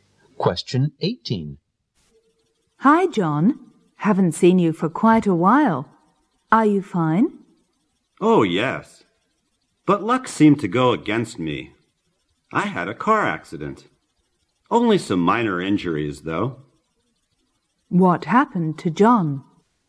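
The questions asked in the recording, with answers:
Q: What happened to John?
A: He had a car accident with minor injuries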